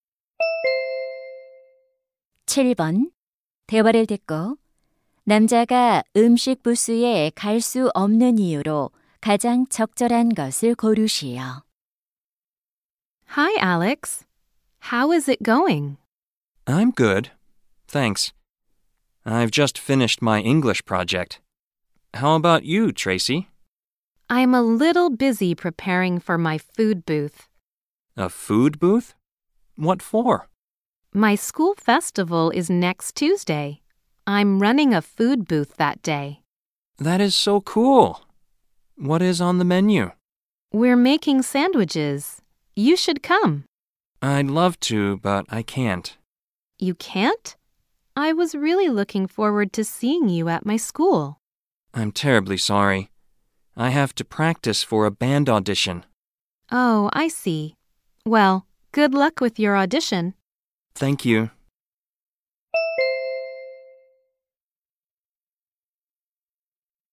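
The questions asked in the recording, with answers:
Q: 남자가 음식 부스에 갈 수 없는 이유로 가장 적절한 것을 고르시오.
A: 밴드 오디션 연습을 해야 해서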